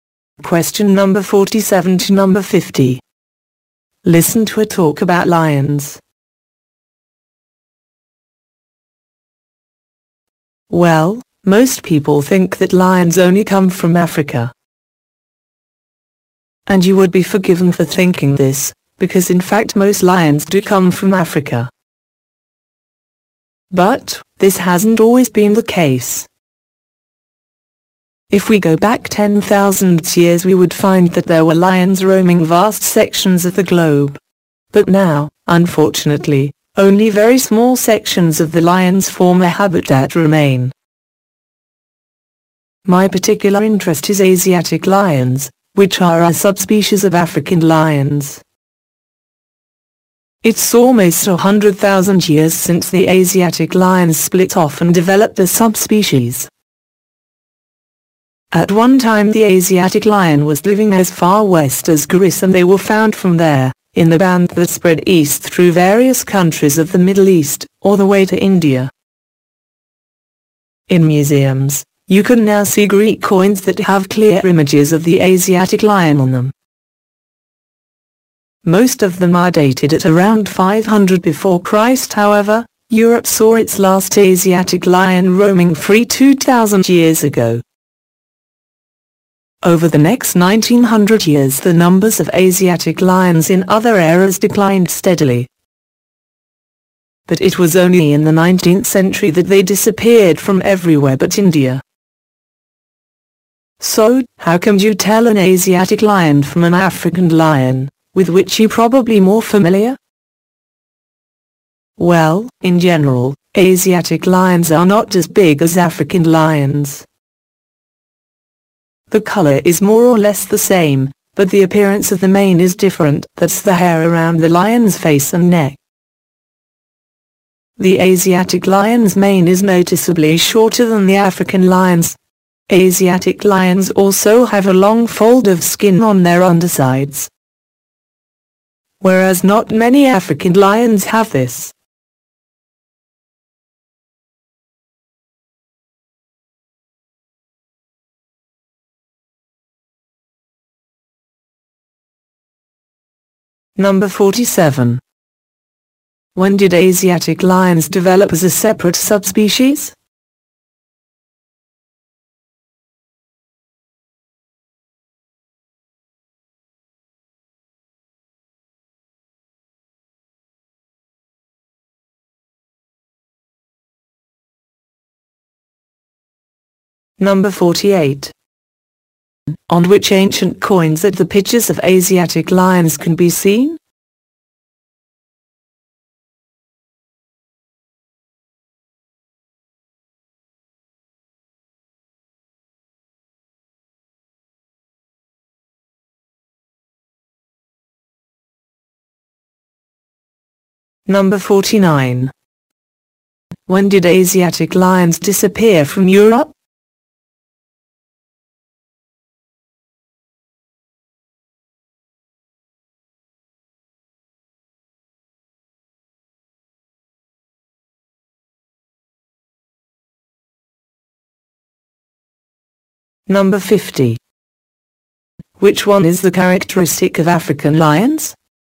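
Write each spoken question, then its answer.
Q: When did Asiatic lions develop as a separate subspecies?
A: Almost 100,000 years ago.

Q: On which ancient coins that the pictures of Asiatic lions can be seen?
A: Greek coins.

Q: When did Asiatic lions disappear from Europe?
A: 2,000 years ago.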